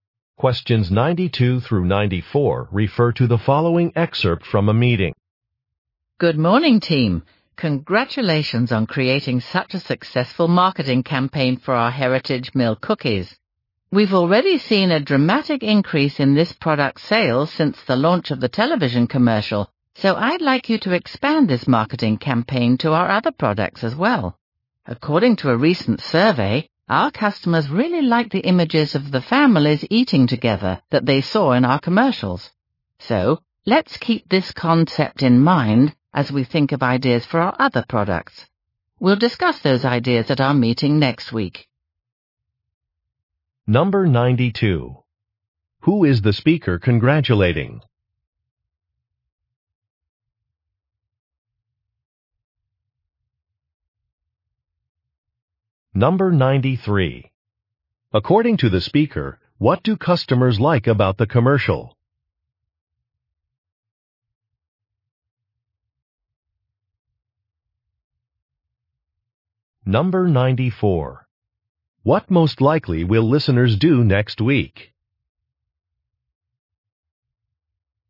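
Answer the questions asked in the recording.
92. The marketing team
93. The images of families eating together
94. Discuss ideas for marketing other products at a meeting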